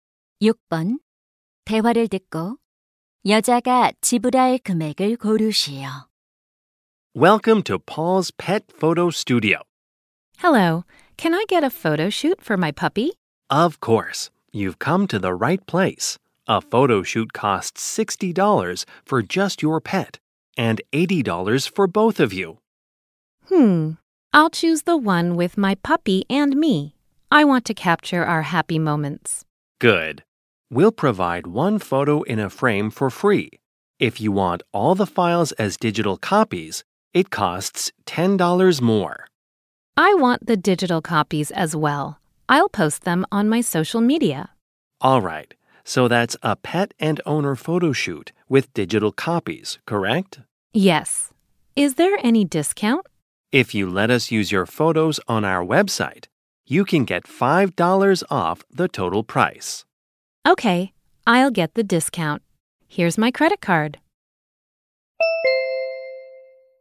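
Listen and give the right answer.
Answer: 85달러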